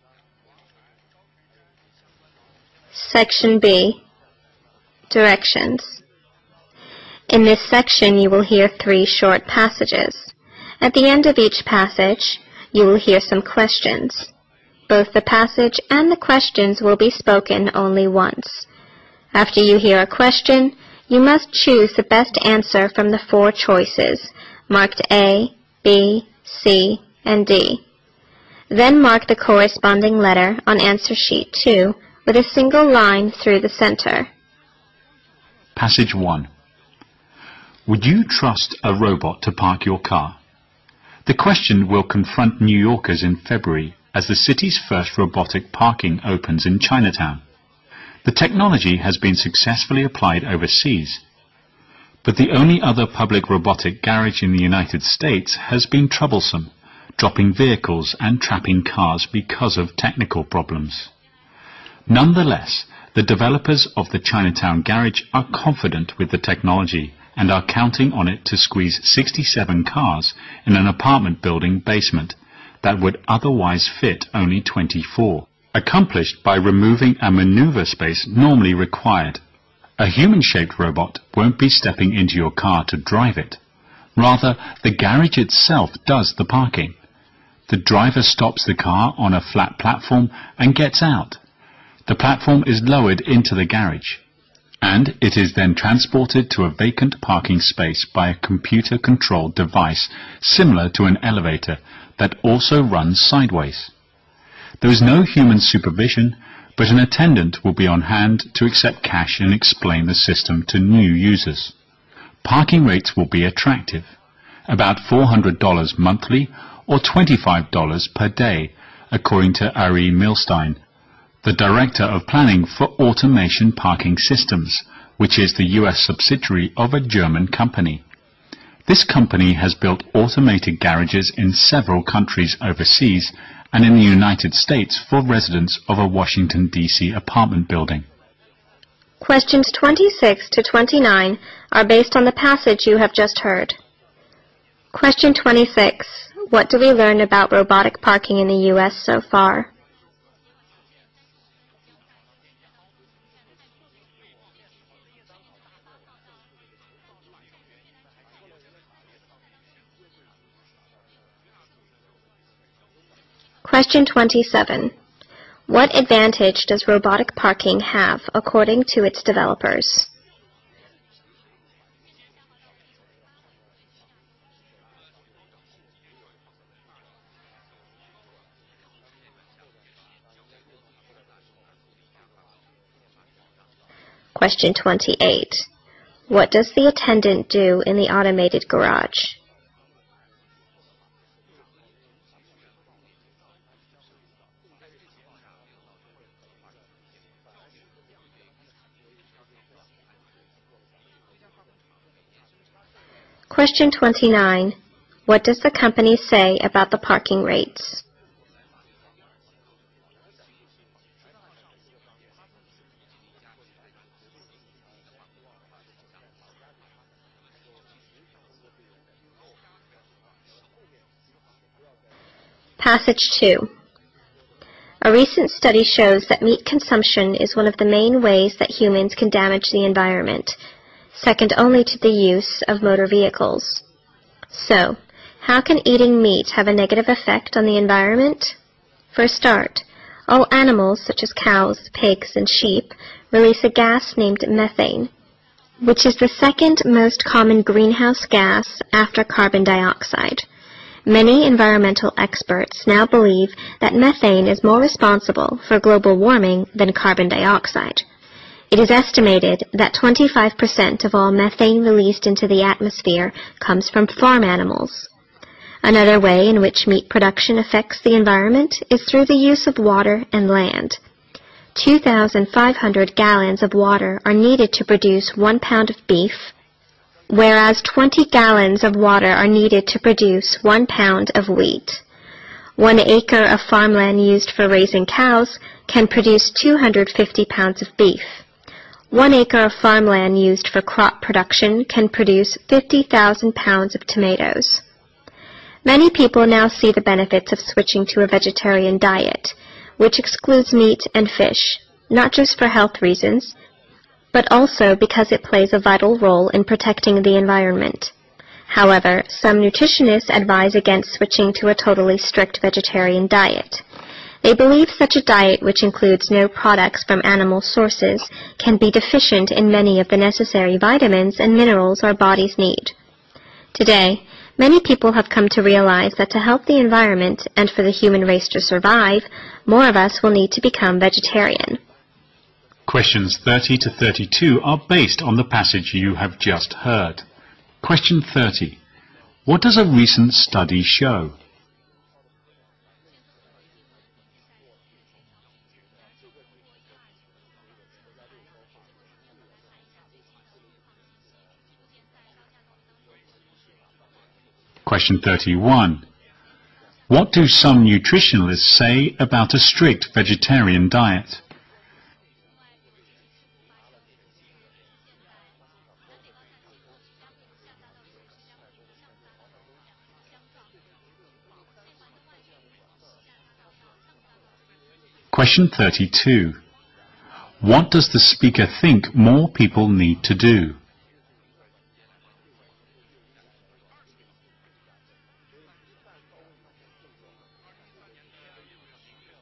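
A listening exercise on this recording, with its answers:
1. What do we learn about the robot parking in the U.S. so far?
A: It has been troublesome because of technical problems.

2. What advantage does robotic parking have according to the developers?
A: It can park many more cars in the same space.

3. What does the attendant do in the automated garage?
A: Accepts cash and explains the system to new users.

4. What does the company say about the parking rate?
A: It will be attractive: about $400 a month or $25 a day.

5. What does the recent study show?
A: Eating meat is one of the main ways humans damage the environment.

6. What do some nutritionists say about the strict vegetarian diet?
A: It may lack necessary vitamins and minerals.

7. What does the speaker think more people need to do?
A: Become vegetarian.

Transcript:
Passage 1
Would you trust a robot to park your car? The question will confront New Yorkers in February as the city's first robotic parking opens in Chinatown.
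The technology has been successfully applied overseas, but the only other public robotic garage in the United States has been troublesome, dropping vehicles and trapping cars because of technical problems.
Nonetheless, the developers of the Chinatown garage are confident with the technology and are counting on it to squeeze 67 cars in an apartment-building basement that would otherwise fit only 24, accomplished by removing a maneuver space normally required.
A human-shaped robot won't be stepping into your car to drive it. Rather, the garage itself does the parking. The driver stops the car on a flat platform and gets out. The platform is lowered into the garage, and it is then transported to a vacant parking space by a computer-controlled device similar to an elevator that also runs sideways.
There is no human supervision, but an attendant will be on hand to accept cash and explain the system to newly users. 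Parking rates will be attracted about $400 monthly or $25 per day, according to Ari Milstein, the director of planning for Automation Parking Systems, which is the U.S. subsidiary of a German company. This company has built automated garages in several countries overseas and in the United States for residents of a Washington, D.C. apartment building.
Questions 26 to 29 are based on the passage you have just heard.
Passage 2
A recent study shows that meat consumption is one of the main ways that human can damage the environment, second only to the use of motor vehicles. So how can eating meat have a negative effect on the environment? For a start, all animals, such as cows, pigs and sheep, always gas limed methane, which is the second most common green house gas after carbon dioxide. Many environmental experts now believe that methane is more responsible for global warming than carbon dioxide. 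It is estimated that 25% of all methane that released into the atmosphere coming from farm animals. Another way in which meat production affects the environment is through the use of water and land. 2,500 gallons of water are needed to produce one pound of beef. While 20 gallons of water are need to produce one pound of wheat. One acre of farmland use to for raising cows can produce 250 pounds of beef. One acre of farmland use to for crop production can produce 1,500 pounds of tomatoes. Many people now say the benefits of switching to vegetarian diet which excludes meat and fish. Not just for health reasons, but also because it plays a vital role in protecting the environment. However, some nutritionists advise against switching to a totally strict vegetarian diet. They believe such a diet which includes no products from animal sources can be deficient in many of the necessary vitamins and minerals our bodies need. 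Today many people have come to realize that help the environment and for the human race to survive, more of us will need to become vegetarian.
Questions 30 to 32 are based on the passage you've just heard.

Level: 六级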